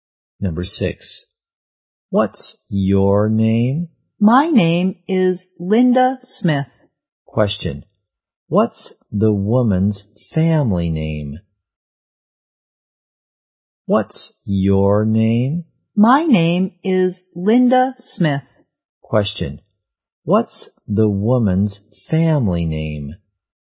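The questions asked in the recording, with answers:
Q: what's the woman's family name?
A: Smith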